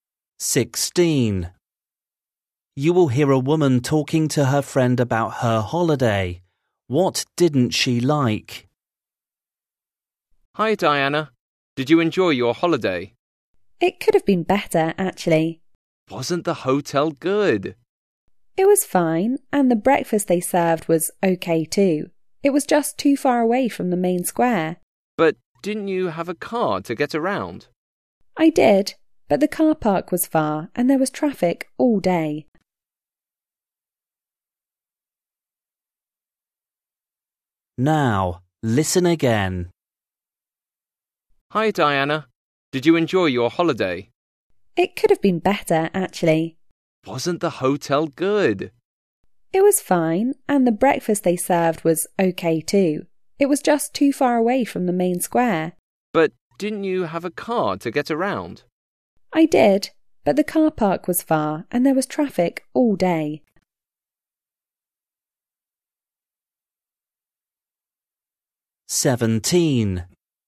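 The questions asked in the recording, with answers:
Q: What didn't she like?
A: the hotel's location, too far from the main square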